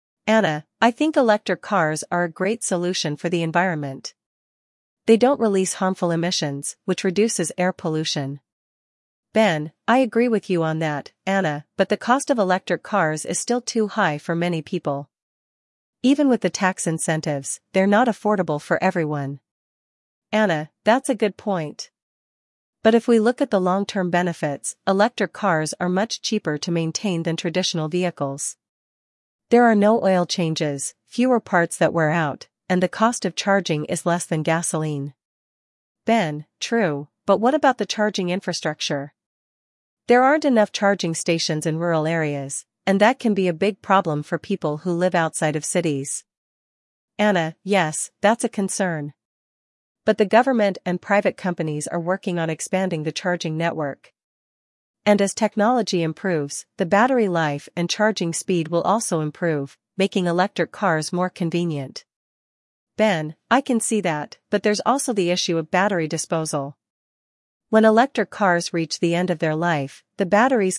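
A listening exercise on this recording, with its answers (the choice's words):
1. What is Anna's main argument for electric cars?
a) They are affordable for everyone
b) They reduce harmful emissions and air pollution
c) They are faster than gasoline cars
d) They are easy to maintain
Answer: They reduce harmful emissions and air pollution

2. What is Ben's concern about electric cars?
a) They are too expensive for most people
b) They are not available in the market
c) They are too slow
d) They are not environmentally friendly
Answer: They are too expensive for most people

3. According to Anna, what is a long-term benefit of electric cars?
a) They are cheaper to maintain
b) They are more expensive to repair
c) They have better acceleration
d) They use less fuel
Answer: They are cheaper to maintain

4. What problem does Ben highlight about electric cars?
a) Battery recycling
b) Charging infrastructure in rural areas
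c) Price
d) Safety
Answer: Charging infrastructure in rural areas

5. What is Anna's response to the charging infrastructure issue?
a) She believes it's not a problem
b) She thinks it will improve with time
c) She suggests using gasoline cars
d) She advocates for reducing the price of electric cars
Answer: She thinks it will improve with time

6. What concern does Ben raise regarding electric car batteries?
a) Their price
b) Battery disposal and environmental impact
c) Their weight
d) Their charging speed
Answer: Battery disposal and environmental impact

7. What does Anna believe will improve with time regarding electric cars?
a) Battery disposal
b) The charging network and technology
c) Their affordability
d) Their safety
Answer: The charging network and technology

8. What is the general tone of the discussion?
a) Indifferent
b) Argumentative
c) Informal and casual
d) Balanced with both pros and cons discussed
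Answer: Balanced with both pros and cons discussed

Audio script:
Anna: I think electric cars are a great solution for the environment. They don't release harmful emissions, which reduces air pollution.
Ben: I agree with you on that, Anna, but the cost of electric cars is still too high for many people. Even with the tax incentives, they're not affordable for everyone.
Anna: That's a good point. But if we look at the long-term benefits, electric cars are much cheaper to maintain than traditional vehicles. There are no oil changes, fewer parts that wear out, and the cost of charging is less than gasoline.
Ben: True, but what about the charging infrastructure? There aren't enough charging stations in rural areas, and that can be a big problem for people who live outside of cities.
Anna: Yes, that's a concern. But the government and private companies are working on expanding the charging network. 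And as technology improves, the battery life and charging speed will also improve, making electric cars more convenient.
Ben: I can see that, but there's also the issue of battery disposal.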